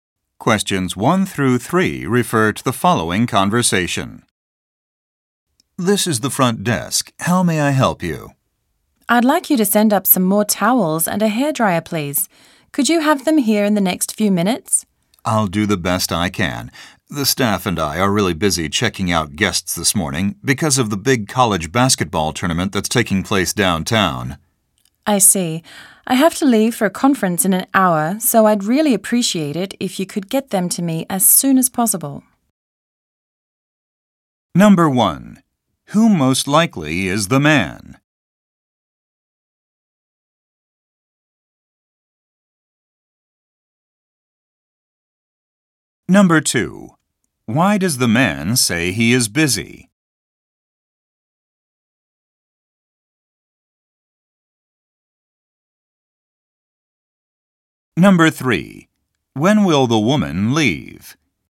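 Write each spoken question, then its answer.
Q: Who most likely is the man?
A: A hotel front desk employee

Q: Why does the man say he is busy?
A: He is checking out guests because of a basketball tournament downtown.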